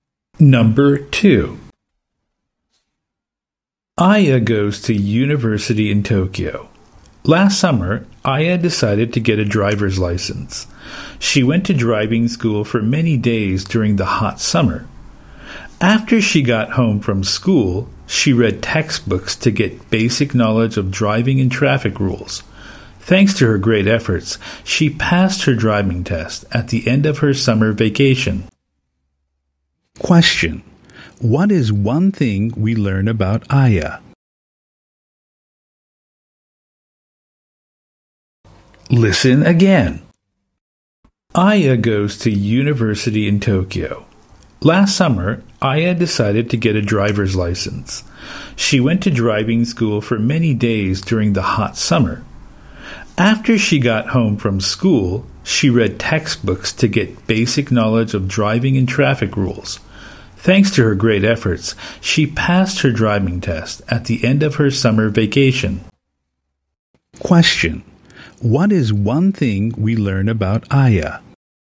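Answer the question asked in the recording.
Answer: She passed her driving test at the end of her summer vacation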